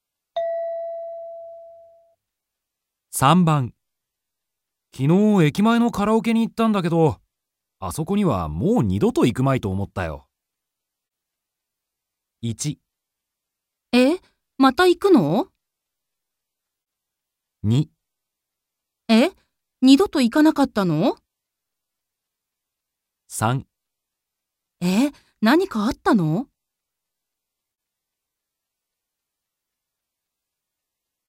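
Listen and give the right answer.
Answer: え?何かあったの?

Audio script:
M: 昨日駅前のカラオケに行ったんだけど、あそこにはもう二度と行くまいと思ったよ。
F: 1. え? また、行くの?
2. え?二度と行かなかったの?
3. え?何かあったの?

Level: N2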